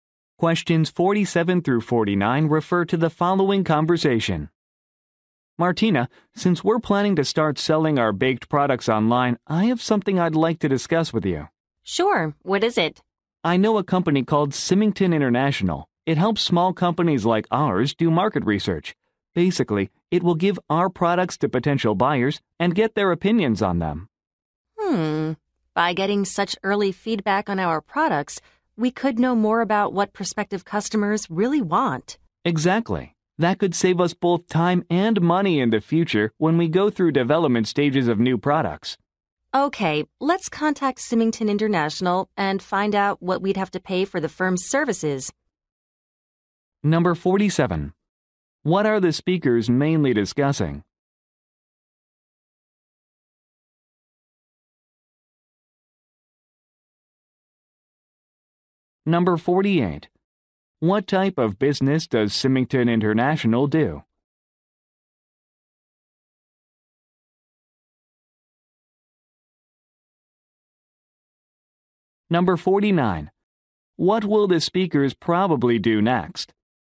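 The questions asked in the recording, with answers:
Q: What are the speakers mainly discussing?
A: Using a market research company

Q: What type of business does Symington International do?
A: Market research

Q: What will the speakers probably do next?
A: Contact Symington International about its fees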